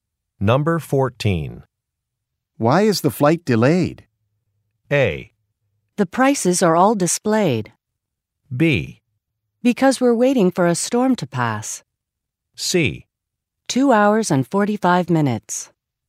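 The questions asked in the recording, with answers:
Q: Why is the flight delayed?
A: B: Because we're waiting for a storm to pass.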